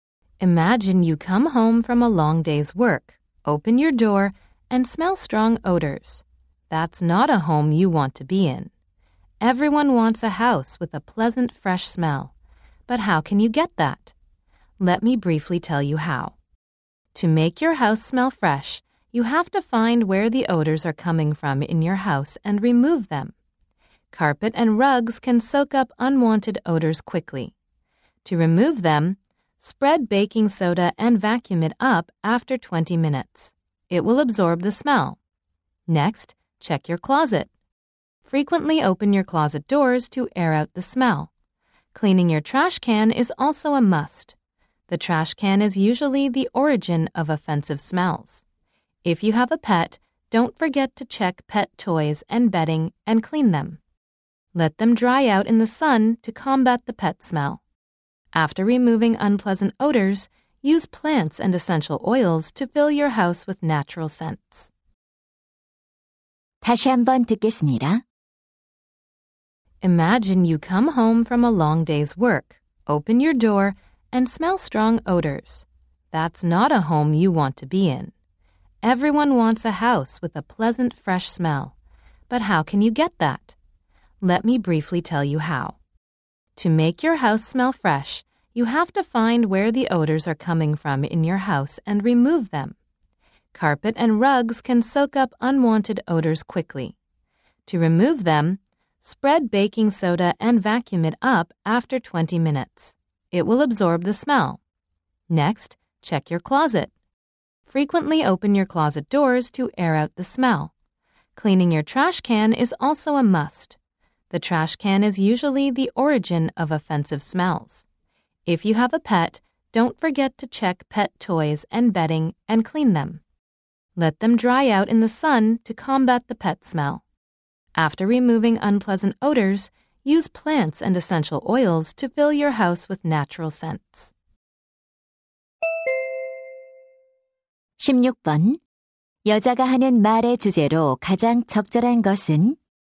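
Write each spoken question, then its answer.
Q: 여자가 하는 말의 주제로 가장 적절한 것은?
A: 집에서 좋은 냄새가 나게 하는 방법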